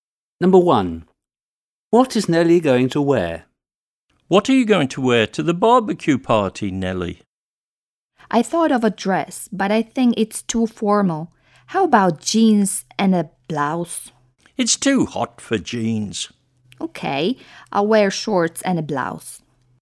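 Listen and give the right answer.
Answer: shorts and a blouse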